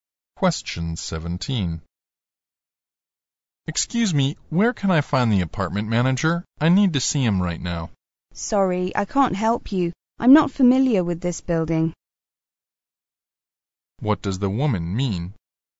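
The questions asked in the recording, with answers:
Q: What does the woman mean?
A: She doesn't know where the manager is because she isn't familiar with the building.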